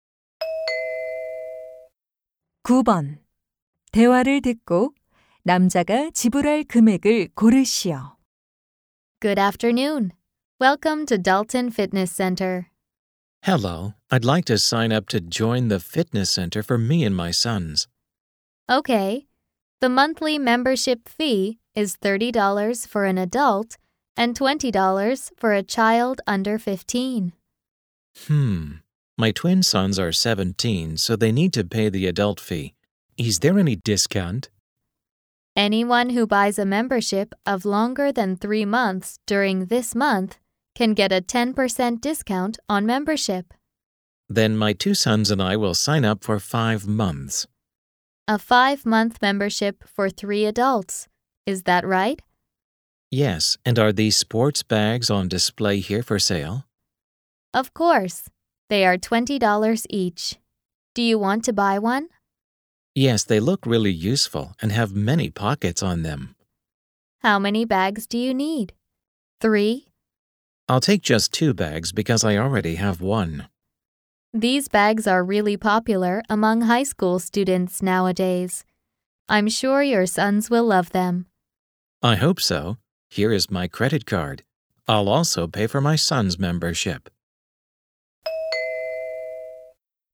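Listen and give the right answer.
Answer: $445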